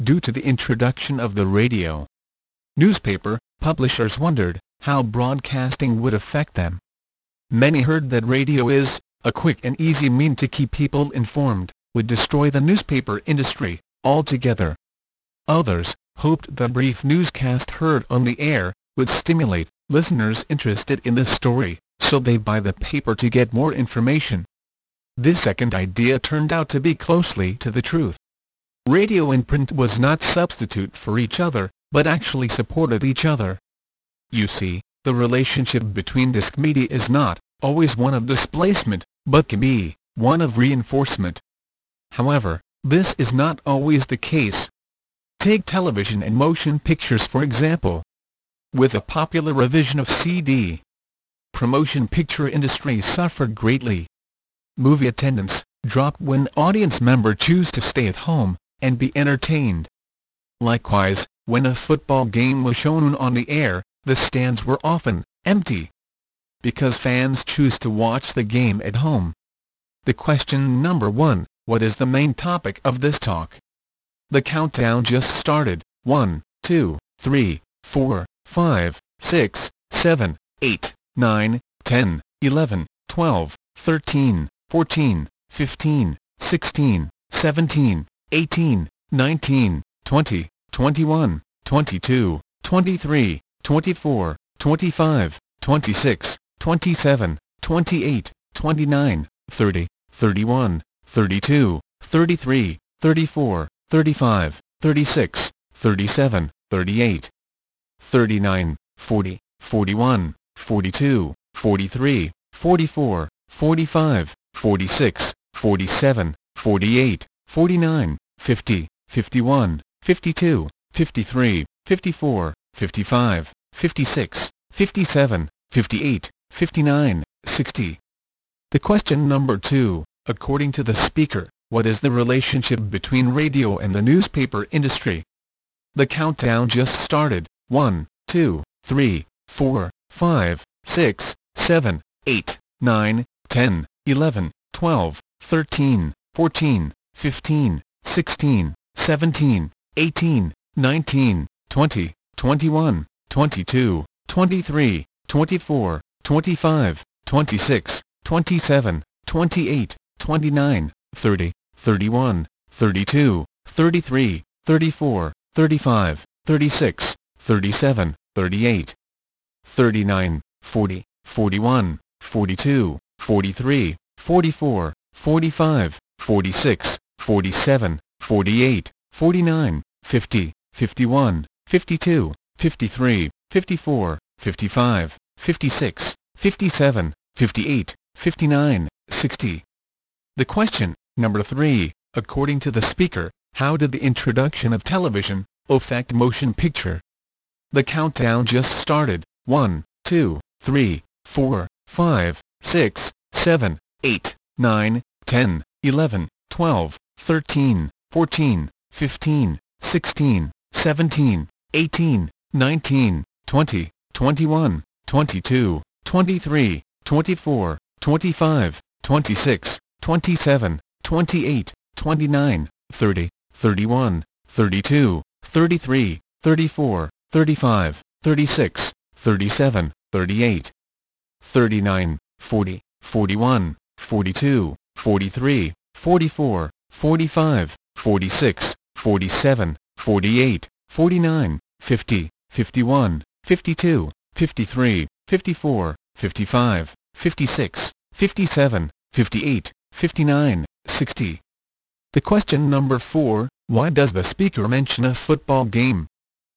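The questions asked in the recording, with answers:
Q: according to the speaker, what is the relationship between radio and the newspaper industry?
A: They supported (reinforced) each other

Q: according to the speaker, how did the introduction of television affect motion picture?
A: The motion picture industry suffered as movie attendance dropped

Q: why does the speaker mention a football game?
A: To show that television kept audiences at home (displacement)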